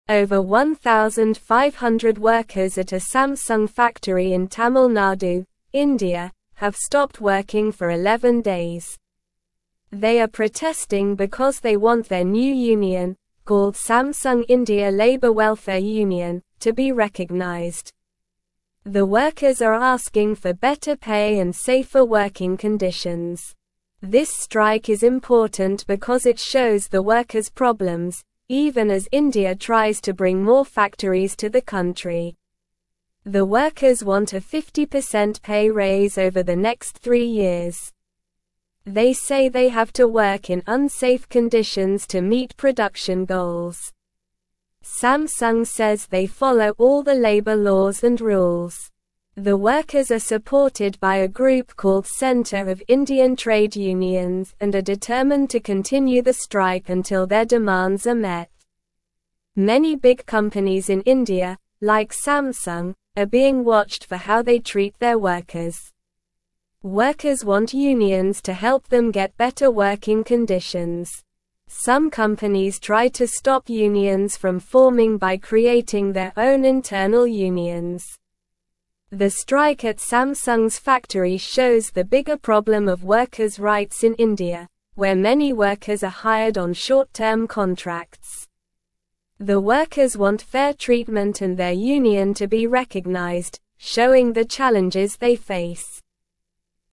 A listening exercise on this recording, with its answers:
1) Over 1,500 (1)______ at a Samsung (2)______ in Tamil Nadu, India, have stopped working for 11 days.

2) Over 1,500 (1)______ at a Samsung (2)______ in Tamil Nadu, India, have stopped working for 11 days.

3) This strike is (3)______ because it (4)______ the workers' problems, even as India tries to bring (5)______ factories to the country.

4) This strike is (3)______ because it (4)______ the workers' problems, even as India tries to bring (5)______ factories to the country.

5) This strike is (3)______ because it (4)______ the workers' problems, even as India tries to bring (5)______ factories to the country.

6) Samsung says they (6)______ all the labor laws and rules.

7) The workers are supported by a group called Centre of Indian Trade Unions and are determined to (7)______ the strike until their demands are met.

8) Workers want unions to help them get (8)______ working (9)______.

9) Workers want unions to help them get (8)______ working (9)______.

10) Some companies try to (10)______ unions from forming by creating their own internal unions.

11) The strike at Samsung's factory shows the bigger problem of workers' (11)______ in India, where many workers are (12)______ on short-term contracts.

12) The strike at Samsung's factory shows the bigger problem of workers' (11)______ in India, where many workers are (12)______ on short-term contracts.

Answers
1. workers
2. factory
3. important
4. shows
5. more
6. follow
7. continue
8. better
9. conditions
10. stop
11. rights
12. hired

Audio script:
Over 1,500 workers at a Samsung factory in Tamil Nadu, India, have stopped working for 11 days. They are protesting because they want their new union, called Samsung India Labour Welfare Union, to be recognized. The workers are asking for better pay and safer working conditions. This strike is important because it shows the workers' problems, even as India tries to bring more factories to the country.
The workers want a 50% pay raise over the next three years. They say they have to work in unsafe conditions to meet production goals. Samsung says they follow all the labor laws and rules. The workers are supported by a group called Centre of Indian Trade Unions and are determined to continue the strike until their demands are met.
Many big companies in India, like Samsung, are being watched for how they treat their workers. Workers want unions to help them get better working conditions. Some companies try to stop unions from forming by creating their own internal unions. The strike at Samsung's factory shows the bigger problem of workers' rights in India, where many workers are hired on short-term contracts. The workers want fair treatment and their union to be recognized, showing the challenges they face.

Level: Level 2